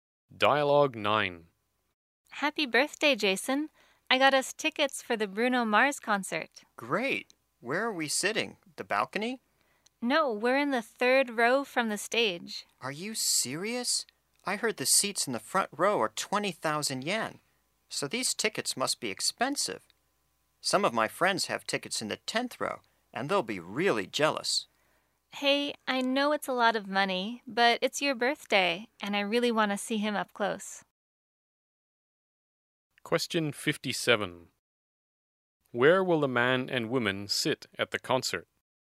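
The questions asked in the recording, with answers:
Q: Where will the man and woman sit at the concert?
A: In the 3rd row from the stage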